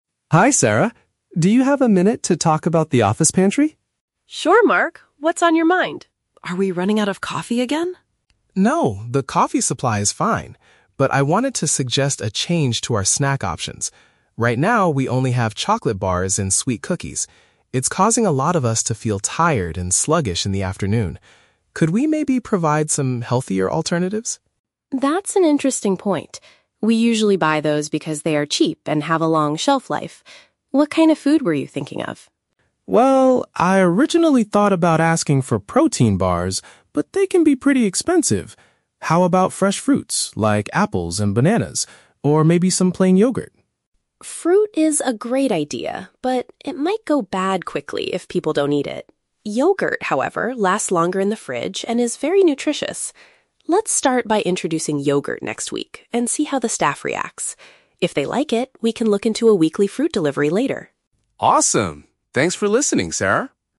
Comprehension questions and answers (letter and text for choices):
Listen to a conversation between an employee and an HR manager. For each question, choose the correct answer (A, B, or C).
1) Why does Mark want to change the office snacks?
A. The office frequently runs out of sweet treats and coffee.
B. The current snacks are making employees feel exhausted later in the day.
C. He wants to help the company reduce its weekly grocery budget.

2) What did Mark initially consider suggesting to the manager?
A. Packaged protein snacks.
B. Sweetened chocolate bars.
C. A daily fresh fruit delivery.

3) What does Sarah agree to do first?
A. Order a large basket of apples and bananas immediately.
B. Buy a new refrigerator to store healthy food properly.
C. Provide a healthy dairy product for the staff to try next week.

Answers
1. B. The current snacks are making employees feel exhausted later in the day.
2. A. Packaged protein snacks.
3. C. Provide a healthy dairy product for the staff to try next week.

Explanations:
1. Mark explains that eating chocolate and cookies is causing the staff to "feel tired and sluggish in the afternoon" (which means feeling exhausted later in the day). Option (A) is a trap; Sarah asks if they are "running out of coffee", but Mark says the supply is fine. Option (C) is a trap; Sarah mentions the current snacks are "cheap", but Mark's motivation is health, not saving money.
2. Mark says, "I originally thought about asking for protein bars" (packaged protein snacks), but he changed his mind because they are expensive. Option (B) is a trap; chocolate bars are what the office currently has, not his suggestion. Option (C) is a trap; Sarah mentions a "weekly fruit delivery" for the future, not a daily one.
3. Sarah decides to start by "introducing yogurt next week" to see how the staff reacts. Yogurt is a healthy dairy product. Option (A) is a trap; Mark suggests apples and bananas, but Sarah rejects this for now because fruit might "go bad quickly". Option (B) is a plausible office need, but they already have a fridge (she says yogurt "lasts longer in the fridge").

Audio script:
Mark: Hi Sarah. Do you have a minute to talk about the office pantry?
Sarah: Sure, Mark. What's on your mind? Are we running out of coffee again?
Mark: No, the coffee supply is fine. But I wanted to suggest a change to our snack options. Right now, we only have chocolate bars and sweet cookies. It's causing a lot of us to feel tired and sluggish in the afternoon. Could we maybe provide some healthier alternatives?
Sarah: That's an interesting point. We usually buy those because they are cheap and have a long shelf life. What kind of food were you thinking of?
Mark: Well, I originally thought about asking for protein bars, but they can be pretty expensive. How about fresh fruits like apples and bananas, or maybe some plain yogurt?
Sarah: Fruit is a great idea, but it might go bad quickly if people don't eat it. Yogurt, however, lasts longer in the fridge and is very nutritious. Let's start by introducing yogurt next week and see how the staff reacts. If they like it, we can look into a weekly fruit delivery later.